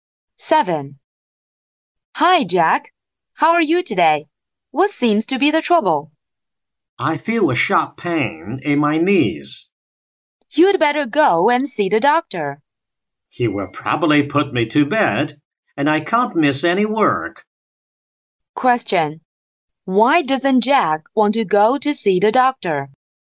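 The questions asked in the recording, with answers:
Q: Why doesn't Jack want to go to see the doctor?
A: He can't miss any work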